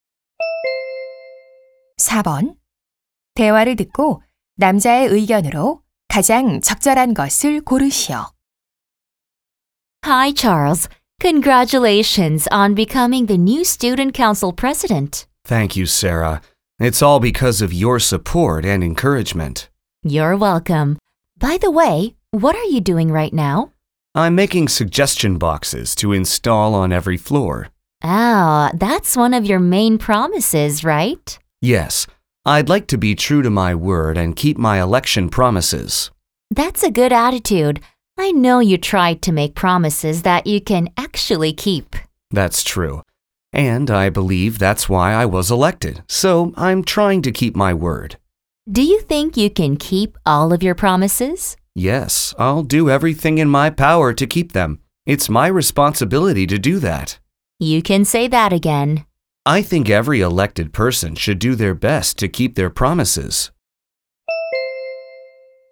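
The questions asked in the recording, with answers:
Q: 대화를 듣고 남자의 의견으로 가장 적절한 것을 고르시오.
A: 선출된 사람은 공약을 지키기 위해 최선을 다해야 한다.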